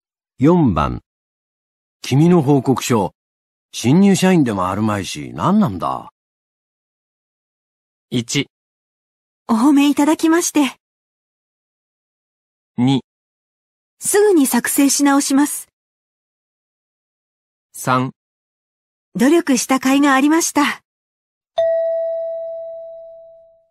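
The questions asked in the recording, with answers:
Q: 君の報告書、新入社員でもあるまいし、何なんだ?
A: 2: すぐに作成し直します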